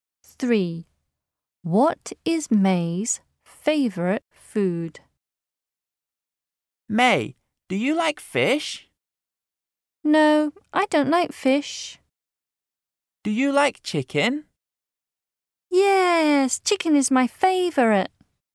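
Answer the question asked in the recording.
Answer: Chicken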